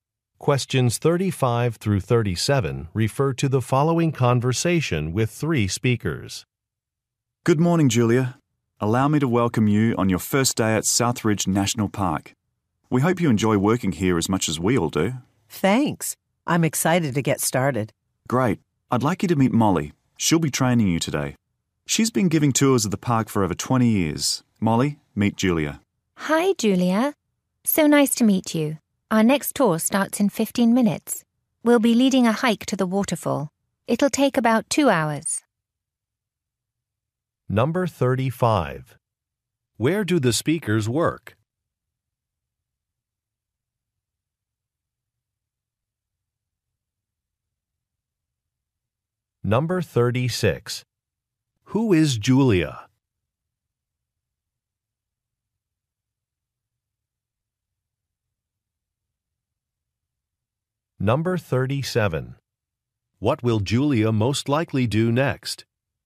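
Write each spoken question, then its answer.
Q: Where do the speakers work?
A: At a national park

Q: Who is Julia?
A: A new employee

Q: What will Julia most likely do next?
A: Go on a hike to the waterfall with a tour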